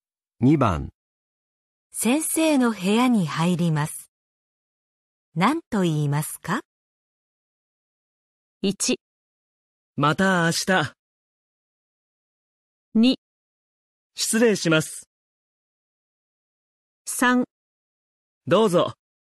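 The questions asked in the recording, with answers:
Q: 先生の部屋に入ります。何と言いますか?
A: 2: 失礼します。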